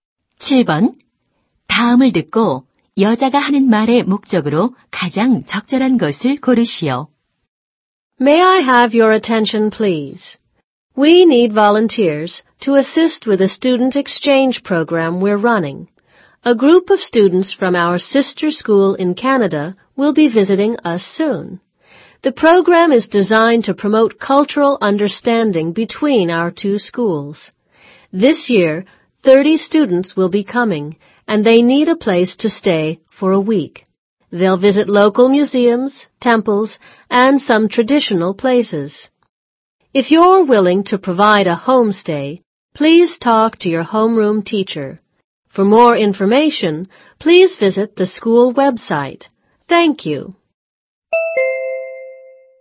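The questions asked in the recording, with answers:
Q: 다음을 듣고 여자가 하는 말의 목적으로 가장 적절한 것을 고르시오.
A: 교환 학생 홈스테이 자원봉사자 모집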